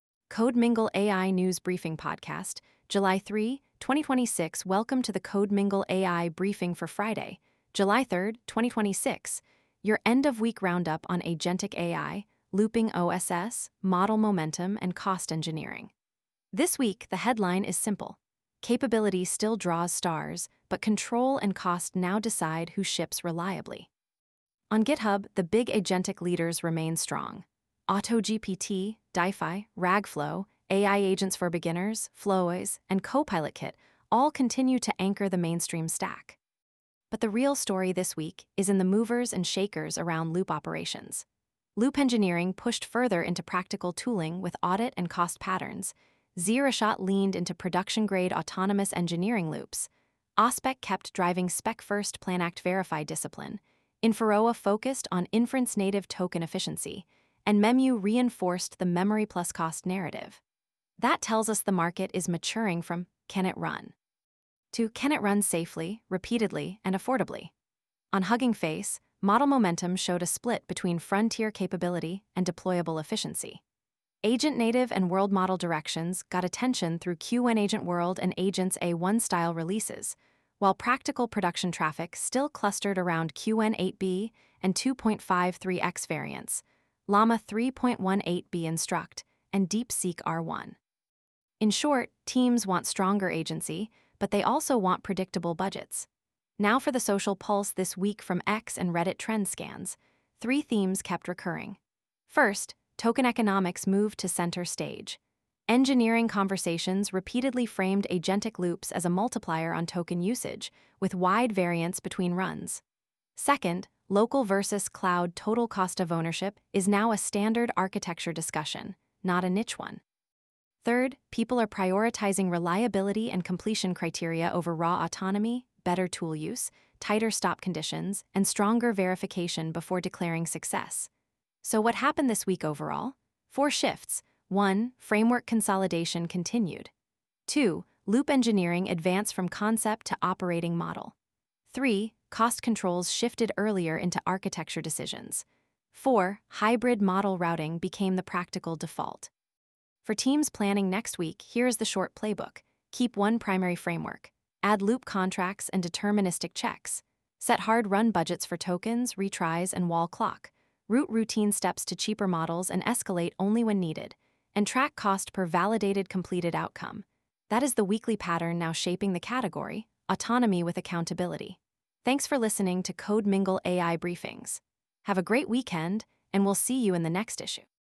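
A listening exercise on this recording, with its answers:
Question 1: What was the most important structural change this week in looping OSS?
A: Projects shifted from slogans to operational controls like loop audits and verification gates.

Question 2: Which metric best captures production efficiency for agent loops?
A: Cost per validated completed outcome

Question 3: Why are hybrid model strategies rising this week?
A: They route easy work to cheaper models and reserve expensive models for difficult branches.

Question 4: What did social discussions emphasize most?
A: Token economics, local-vs-cloud TCO, and reliable completion criteria

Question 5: What should teams do first next week to reduce loop risk?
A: Add loop contracts, budget policies, and deterministic checks before scale-up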